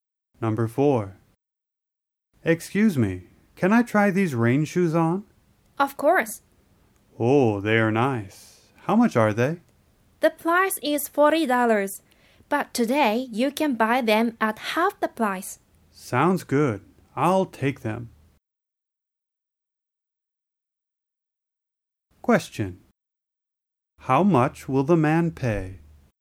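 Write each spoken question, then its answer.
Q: How much will the man pay?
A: $20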